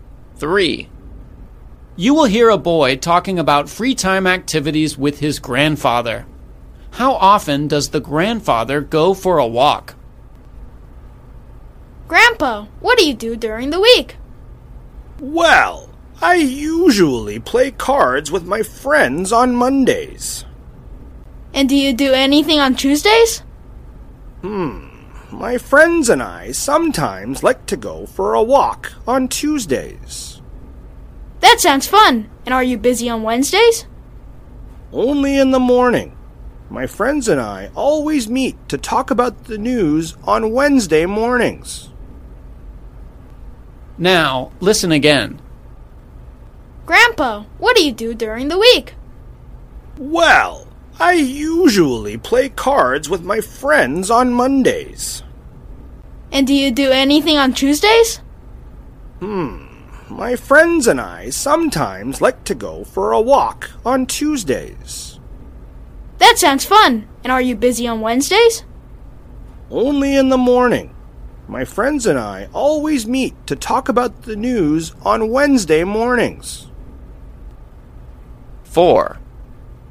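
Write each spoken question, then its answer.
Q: How often does the grandfather go for a walk?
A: Sometimes, on Tuesdays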